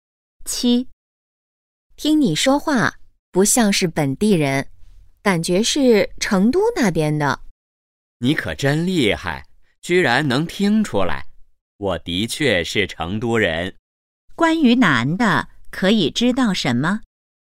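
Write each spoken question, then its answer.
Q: 关于男的,可以知道什么?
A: 他是成都人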